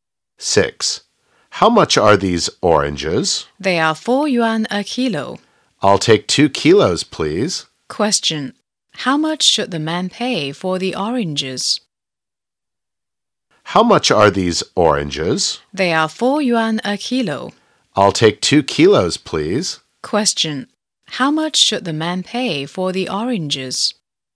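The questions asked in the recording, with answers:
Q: How much should the man pay for the oranges?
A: 8 yuan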